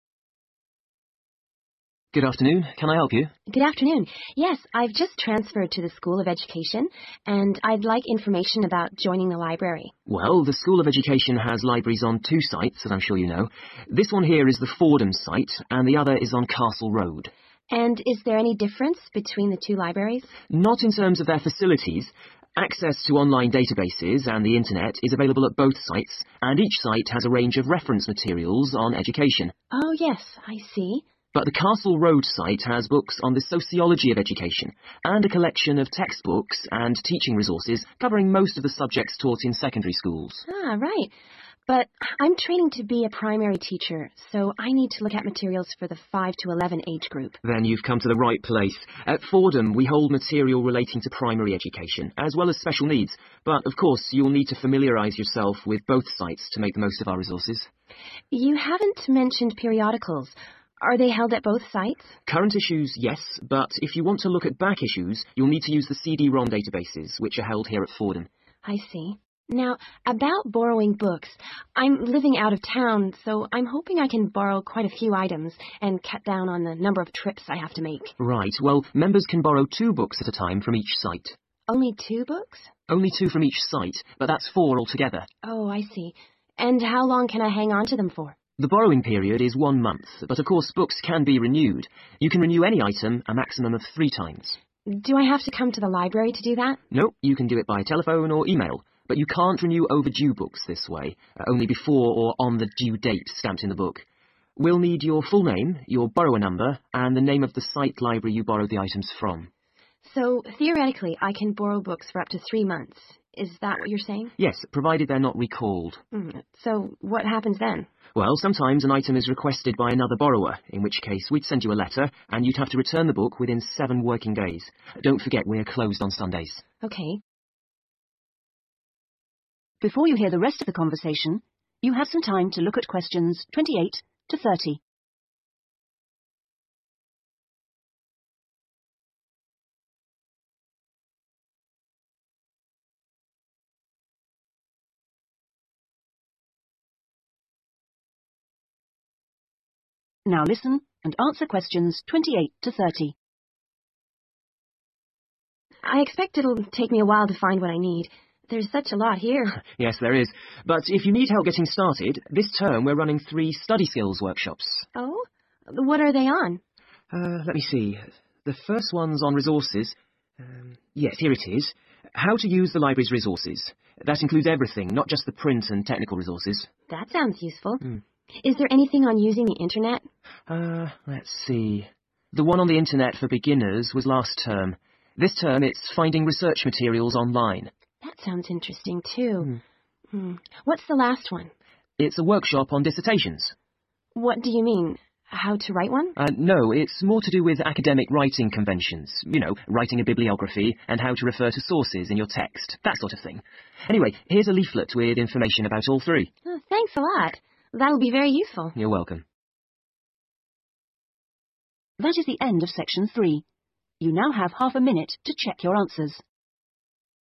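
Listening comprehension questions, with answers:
Complete the summary below. Write ONE WORD ONLY for each answer.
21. The libraries on both sites provide internet access and have a variety of (21) ................ materials on education.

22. The Castle Road library has books on sociology together with (22) ............. and other resources relevant to the majority of (23) ................ school subjects.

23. The Castle Road library has books on sociology together with (22) ............. and other resources relevant to the majority of (23) ................ school subjects.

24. The Fordham library includes resources for teaching in (24) .............. education and special needs.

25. Current issues of periodicals are available at both libraries although (25) ........... issues are only available at Fordham.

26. Which books cannot be renewed by telephone or email? ..................................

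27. How much time is allowed to return recalled books? .........................................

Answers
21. reference
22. textbooks
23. secondary
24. primary
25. back
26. overdue books
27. 7 working days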